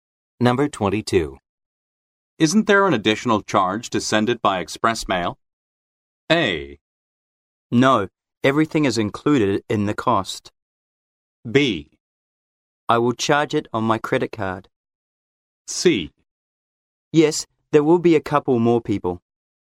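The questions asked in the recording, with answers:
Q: Isn't there an additional charge to send it by express mail?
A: A: No, everything is included in the cost.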